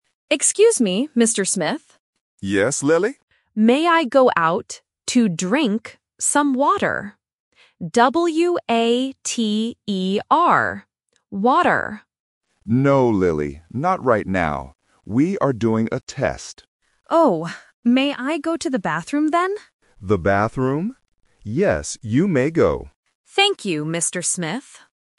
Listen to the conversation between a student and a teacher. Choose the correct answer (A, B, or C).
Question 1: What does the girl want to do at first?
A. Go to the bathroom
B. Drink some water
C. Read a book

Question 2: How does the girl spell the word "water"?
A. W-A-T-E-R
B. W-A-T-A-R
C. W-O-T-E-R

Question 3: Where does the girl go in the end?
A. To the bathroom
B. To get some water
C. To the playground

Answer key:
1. B
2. A
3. A

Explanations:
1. The girl clearly asks first: "May I go out to drink some water?". Option (A) is the trap because she asks for it later. Option (C) is a plausible classroom activity but is not mentioned at all.
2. The girl spells the word out loudly and clearly: "W-A-T-E-R." Options (B) and (C) are common phonetic spelling traps for A1 learners.
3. The teacher rejects the first request but agrees to the second one by saying, "The bathroom? Yes, you may go." Option (B) is the trap because the teacher explicitly said "No" to it. Option (C) is not mentioned.

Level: A1

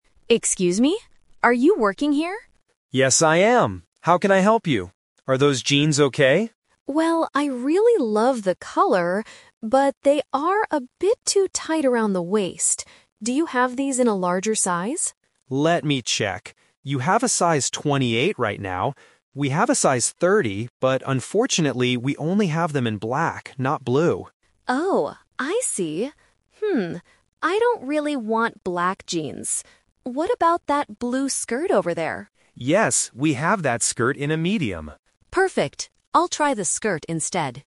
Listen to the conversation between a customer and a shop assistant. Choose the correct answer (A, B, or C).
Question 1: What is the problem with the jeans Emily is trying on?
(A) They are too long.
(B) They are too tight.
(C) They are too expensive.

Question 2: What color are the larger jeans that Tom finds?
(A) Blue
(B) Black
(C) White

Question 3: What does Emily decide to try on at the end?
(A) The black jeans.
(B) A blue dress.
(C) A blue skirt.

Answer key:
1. B
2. B
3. C

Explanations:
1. Emily says, "they are a bit too tight around the waist." Option (A) and (C) are plausible problems when shopping for clothes, but they are not mentioned in the audio.
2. Tom says they have a larger size, "but unfortunately, we only have them in black, not blue." Option (A) is the color Emily wants and currently has, but it is not available in the larger size.
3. This question uses the "Twist" technique. Tom offers the black jeans (Option A), but Emily rejects them ("I don't really want black jeans"). Instead, she changes her plan and asks to try the "blue skirt" over there. Option (B) is a trap using the correct color but the wrong clothing item.

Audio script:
Emily: Excuse me? Are you working here?
Tom: Yes, I am. How can I help you? Are those jeans okay?
Emily: Well, I really love the color, but they are a bit too tight around the waist. Do you have these in a larger size?
Tom: Let me check. You have a size 28 right now. We have a size 30, but unfortunately, we only have them in black, not blue.
Emily: Oh, I see. I don't really want black jeans. What about that blue skirt over there?

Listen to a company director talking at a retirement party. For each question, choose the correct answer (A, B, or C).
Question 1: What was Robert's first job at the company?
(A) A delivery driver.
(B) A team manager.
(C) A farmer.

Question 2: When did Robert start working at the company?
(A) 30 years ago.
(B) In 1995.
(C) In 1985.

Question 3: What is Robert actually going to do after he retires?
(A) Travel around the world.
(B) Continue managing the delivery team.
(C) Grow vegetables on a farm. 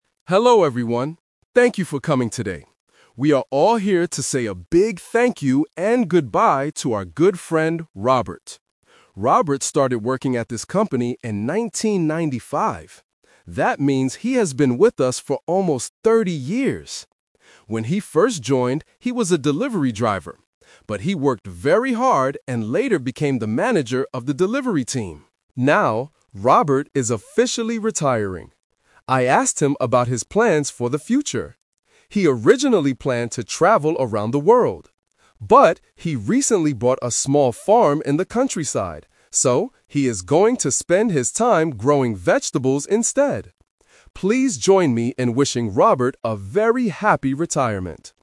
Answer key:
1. A
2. B
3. C

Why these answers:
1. The director explicitly states, "When he first joined, he was a delivery driver" (Option A - Key). Option B is a trap because he later became a manager. Option C is also a trap because farming is what he will do in the future, not his first job.
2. The director says, "Robert started working at this company in 1995" (Option B - Key). Option A is a trap; the director says he has been with them for almost 30 years, not exactly 30 years ago. Option C is a plausible distractor but is not mentioned.
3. The director mentions that Robert "originally planned to travel around the world" (Option A - Trap). However, the word "But" introduces his real plan: he bought a small farm and is going to "spend his time growing vegetables instead" (Option C - Key). Option B is wrong because he is retiring from his manager job.

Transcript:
Company Director: Hello everyone. Thank you for coming today. We are all here to say a big thank you and goodbye to our good friend, Robert. Robert started working at this company in 1995. That means he has been with us for almost thirty years! When he first joined, he was a delivery driver. But he worked very hard and later became the manager of the delivery team. Now, Robert is officially retiring. I asked him about his plans for the future. He originally planned to travel around the world. But, he recently bought a small farm in the countryside, so he is going to spend his time growing vegetables instead. Please join me in wishing Robert a very happy retirement!

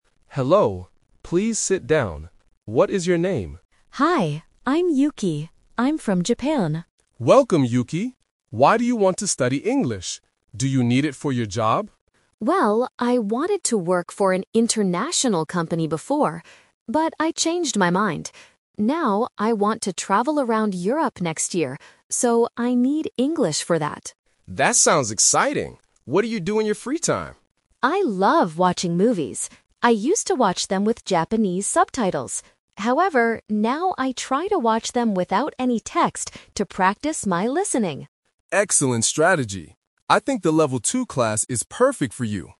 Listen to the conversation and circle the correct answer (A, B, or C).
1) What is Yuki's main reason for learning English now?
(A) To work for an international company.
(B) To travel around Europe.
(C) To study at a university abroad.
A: B

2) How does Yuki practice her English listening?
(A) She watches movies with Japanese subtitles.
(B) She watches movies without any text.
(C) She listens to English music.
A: B

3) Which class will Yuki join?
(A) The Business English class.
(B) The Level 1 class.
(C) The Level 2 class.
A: C

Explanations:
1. Option (A) is the trap. The teacher asks about her job, and she says she wanted to work for an international company before, but she "changed her mind." Option (C) was not mentioned.
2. Yuki says, "...now I try to watch them without any text to practice my listening." Why the trap is wrong: Option (A) is the trap. She says "I used to watch them with Japanese subtitles," which means this is a past habit, not what she does now to practice. Option (C) is a plausible guess but was not mentioned.
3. At the end of the interview, the teacher says, "I think the Level 2 class is perfect for you." Why the trap is wrong: Option (A) is a trap. The word "Business" relates to the "job" and "company" mentioned earlier in the audio, but it is not the name of the class. Option (B) was not mentioned.

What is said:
Mr. Davis: Hello. Please sit down. What is your name?
Yuki: Hi, I'm Yuki. I'm from Japan.
Davis: Welcome, Yuki. Why do you want to study English? Do you need it for your job?
Yuki: Well, I wanted to work for an international company before. But I changed my mind. Now, I want to travel around Europe next year, so I need English for that.
Mr. Davis: That sounds exciting! What do you do in your free time?
Yuki: I love watching movies. I used to watch them with Japanese subtitles. However, now I try to watch them without any text to practice my listening.

